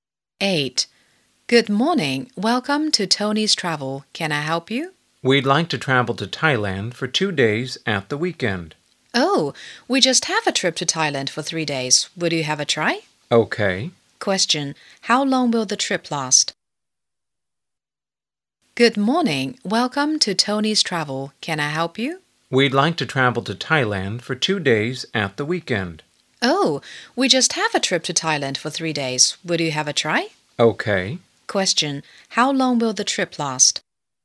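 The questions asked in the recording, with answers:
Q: Question. How long will the trip last?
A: 3 days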